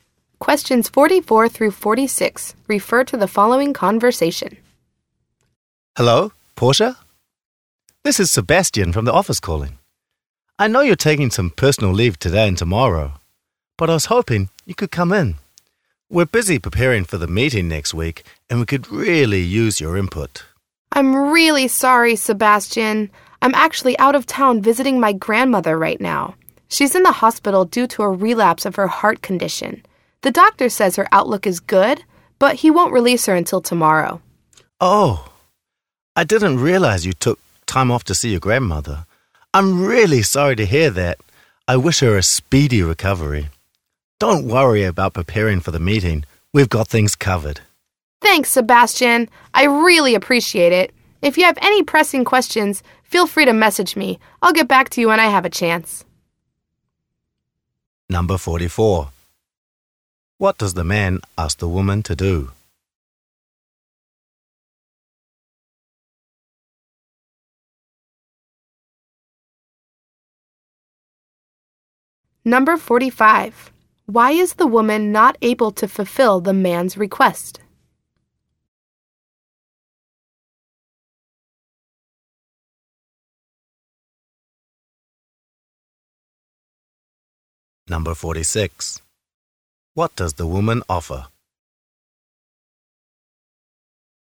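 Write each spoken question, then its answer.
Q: What does the man ask the woman to do?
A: Come in to the office

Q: Why is the woman not able to fulfill the man's request?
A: She is out of town visiting her grandmother in the hospital

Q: What does the woman offer?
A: To answer pressing questions by message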